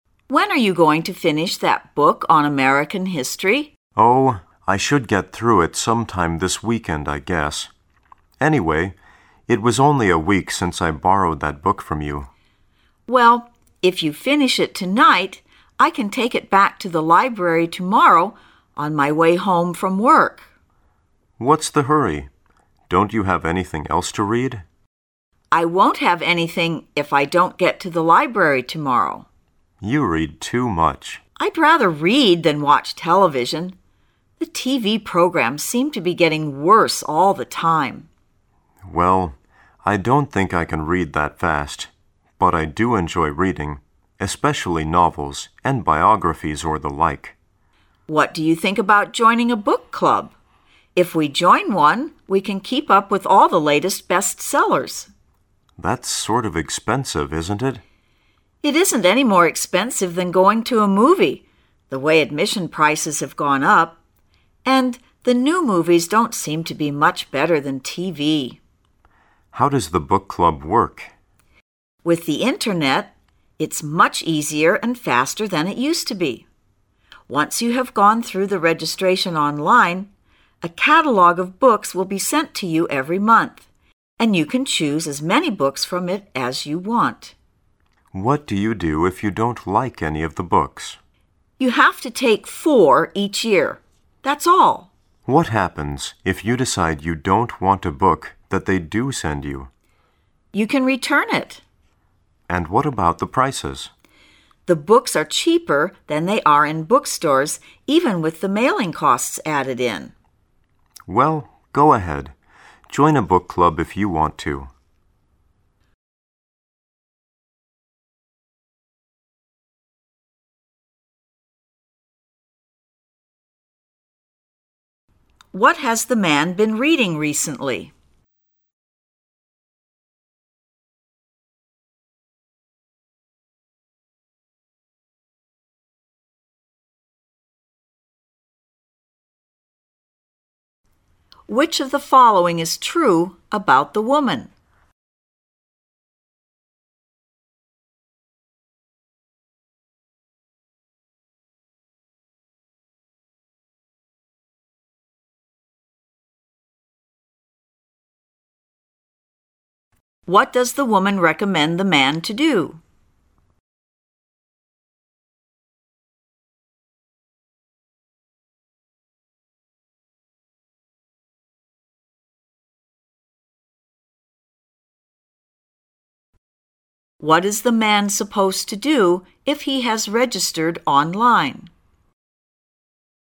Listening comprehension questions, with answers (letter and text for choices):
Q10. Which of the following is TRUE about the woman?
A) She reads a lot.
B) She is a student.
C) She has to work this weekend.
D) She does not like the man.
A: A) She reads a lot.

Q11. What does the woman recommend the man to do?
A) Write about himself.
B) Join a book club.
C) Read books online.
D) Register with the library.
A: B) Join a book club.

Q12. What is the man supposed to do if he has registered online?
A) Return the book the next day.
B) Read the catalogue every month.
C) Purchase a few books each year.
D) Help the woman join a book club.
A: C) Purchase a few books each year.

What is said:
[解析] 19-22 W: When are you going to finish that book on American History? M: Oh, I should get through it sometime this weekend I guess. Anyway, it was only a week since I borrowed that book from you. W: Well, if you finish it tonight, I can take it back to the library tomorrow on my way home from work. M: What's the hurry? Don't you have anything else to read? W: I won't have anything if I don't get to the library tomorrow. M: You read too much. W: I'd rather read than watch television. The TV programs seem to be getting worse all the time. M: Well. I don't think I can read that fast, but I do enjoy reading, especially novels and biographies or the like. W: What do you think about joining a book club? If we join one, we can keep up with all the latest bestsellers. M: That's sort of expensive, isn't it? W: It isn't any more expensive than going to a movie, the way admission prices have gone up. And the new movies don't seem to be much better than TV. M: How does the book club work? W: With the Internet, it's much easier and faster than it used to be. Once you have gone through the registration online, a catalogue of books will be sent to you every month, and you can choose as many books from it as you want. M: What do you do if you don't like any of the books? W: You have to take four each year, that's all. M: What happens if you decide you don't want a book that they do send you? W: You can return it. M: And what about the prices? W: The books are cheaper than they are in bookstores even with the mailing costs added in. M: Well, go ahead; join a book club if you want to. What has the man been reading recently?